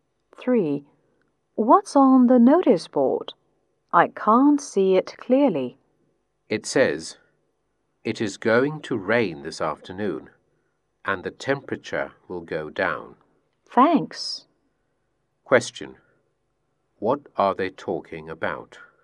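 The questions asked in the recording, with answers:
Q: What are they talking about?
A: The weather.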